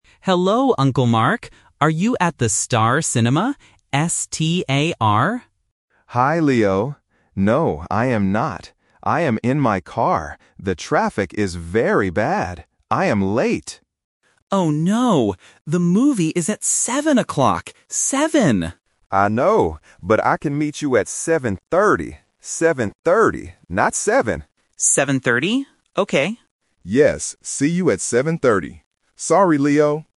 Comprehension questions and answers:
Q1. Where are they going to meet?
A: At the cinema

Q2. What is the name of the cinema?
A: Star

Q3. What time will Uncle Mark meet Leo?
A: 7:30